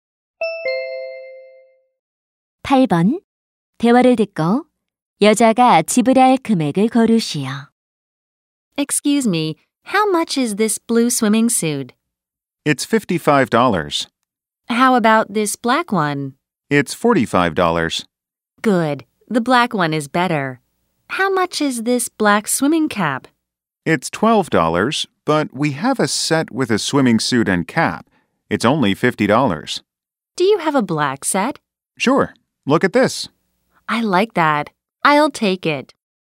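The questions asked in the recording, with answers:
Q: 대화를 듣고 여자가 지불할 금액을 고르시오.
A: 50달러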